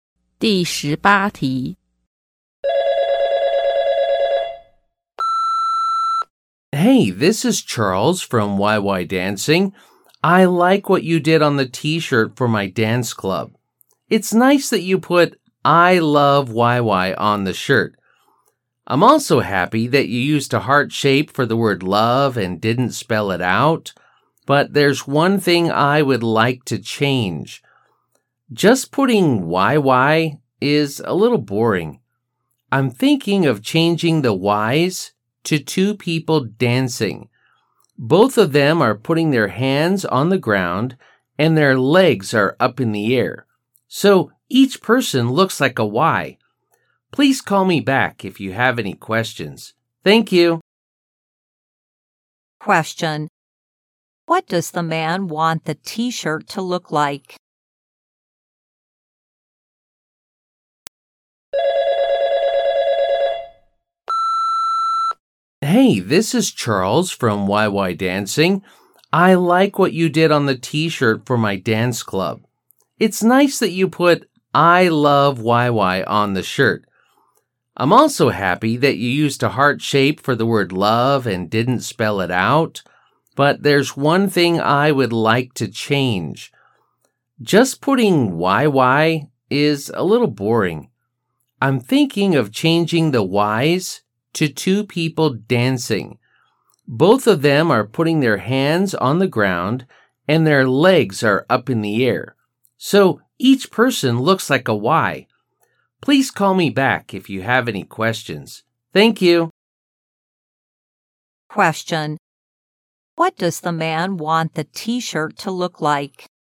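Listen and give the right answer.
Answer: "I", a heart, and two dancers upside down with their hands on the ground and legs in the air, each shaped like a Y.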